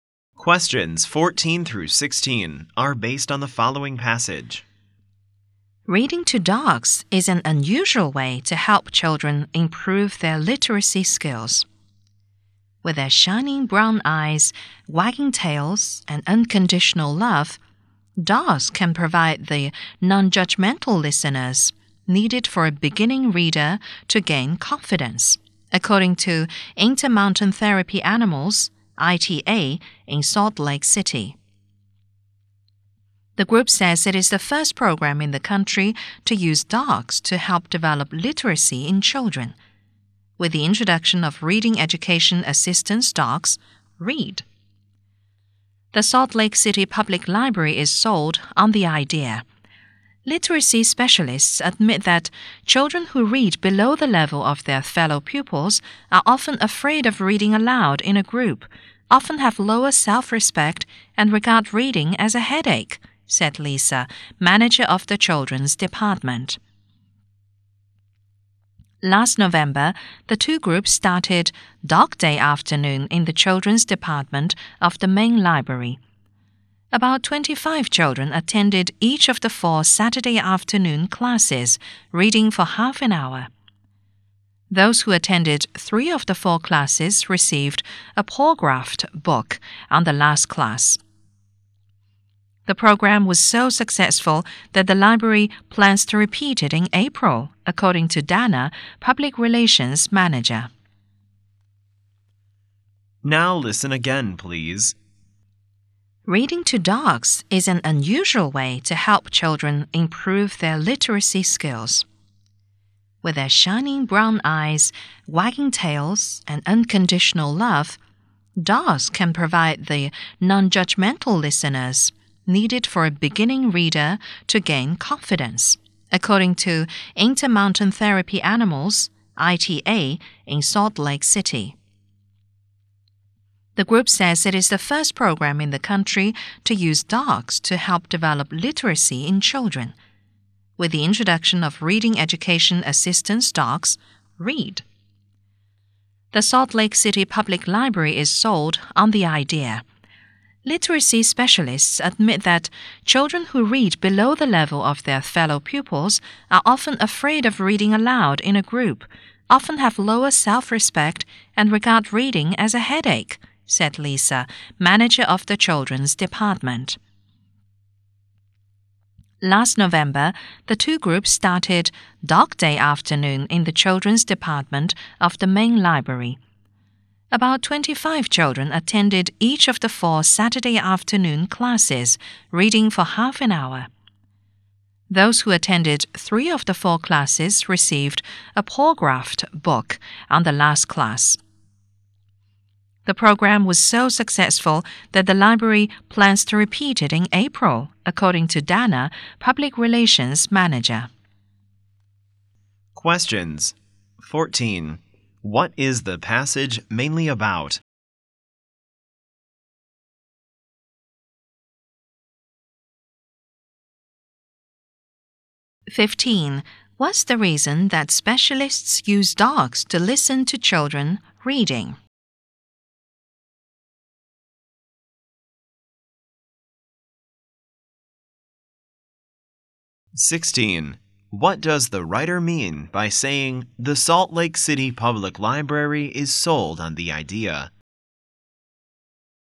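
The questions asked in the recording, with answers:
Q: What is the passage mainly about?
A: Children reading to dogs to improve their literacy

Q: What's the reason that specialists use dogs to listen to children reading?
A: Dogs are non-judgmental listeners that help beginning readers gain confidence

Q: What does the writer mean by saying the Salt Lake City Public Library is sold on the idea?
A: The library accepts and supports the idea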